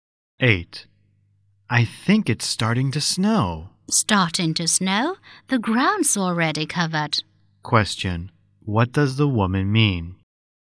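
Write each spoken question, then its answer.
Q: What does the woman mean?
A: It has already been snowing for a while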